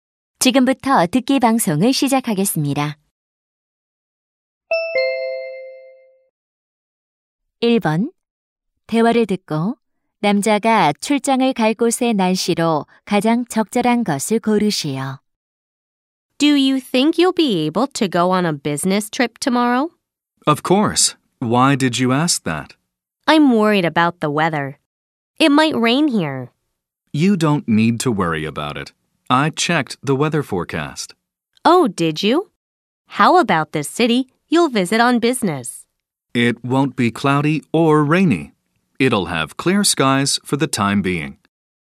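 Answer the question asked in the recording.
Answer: 맑음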